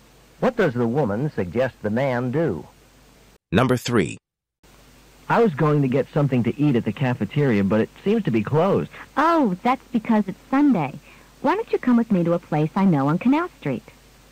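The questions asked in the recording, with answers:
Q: What does the woman suggest they do?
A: Go eat at a place on Canal Street.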